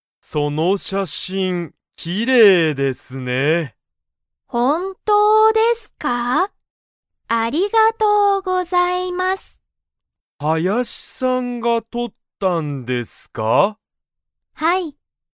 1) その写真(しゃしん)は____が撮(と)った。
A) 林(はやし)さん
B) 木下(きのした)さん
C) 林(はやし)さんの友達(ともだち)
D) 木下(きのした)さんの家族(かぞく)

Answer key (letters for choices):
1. A

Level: Level 1